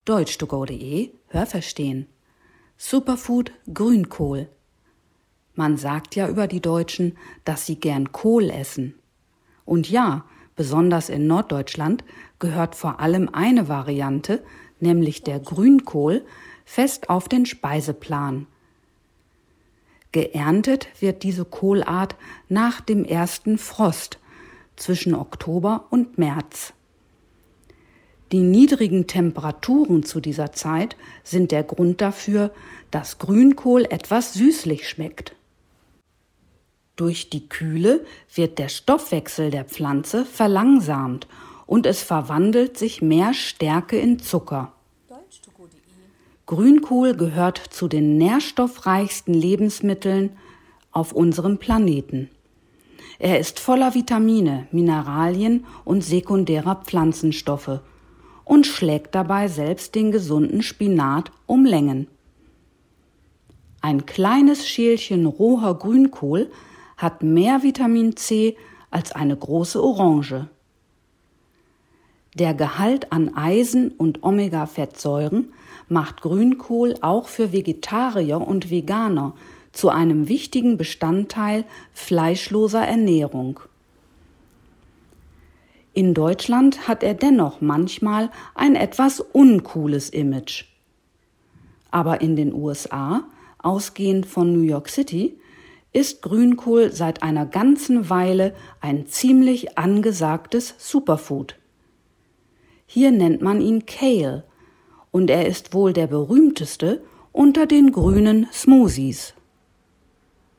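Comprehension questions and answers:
Haben Sie das gehört? Stimmt diese Aussage?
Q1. Grünkohl wird im Sommer geerntet.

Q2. Durch die niedrigen Temperaturen der Erntezeit entsteht im Grünkohl ein salziger Geschmack.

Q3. Grünkohl gehört zu den nährstoffreichsten Lebensmitteln auf unserem Planeten.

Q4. Grünkohl hat mehr Nährstoffe als Spinat.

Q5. Nur Orangen haben mehr Vitamin C als Grünkohl.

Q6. Für Vegetarier und Veganer ist Grünkohl wegen seines Gehalts an Eisen und Omega-Fettsäuren ein wichtiges Lebensmittel.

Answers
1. Nein, das habe ich nicht gehört.
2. Nein, das habe ich nicht gehört.
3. Ja, das habe ich gehört.
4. Ja, das habe ich gehört.
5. Nein, das habe ich nicht gehört.
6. Ja, das habe ich gehört.

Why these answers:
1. Er wird nach dem ersten Frost zwischen Oktober und März geerntet.
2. Der Geschmack ist süßlich, da durch die Kühle in der Pflanze vermehrt Stärke in Zucker umgewandelt wird.
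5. Ein kleines Schälchen Grünkohl hat mehr von diesem Vitamin als eine große Orange.

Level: B1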